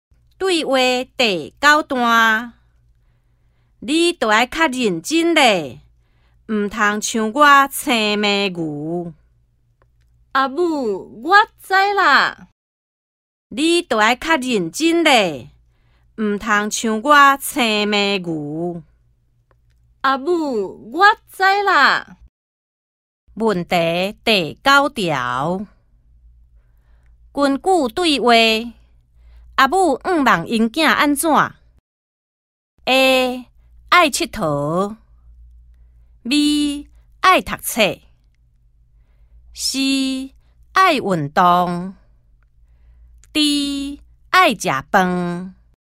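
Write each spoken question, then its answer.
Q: 根据对话,阿母唔望因囝安怎 ?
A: B: 爱读册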